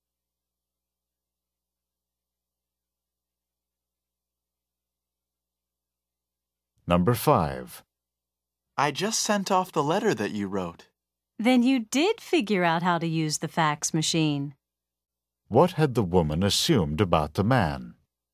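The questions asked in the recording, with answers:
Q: What had the woman assumed about the man?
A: That he didn't know how to use the fax machine.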